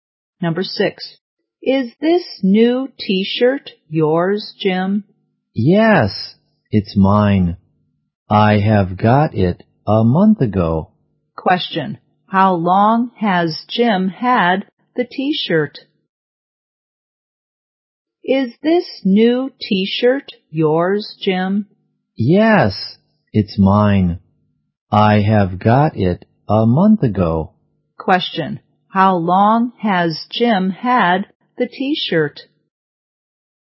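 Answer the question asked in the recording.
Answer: For a month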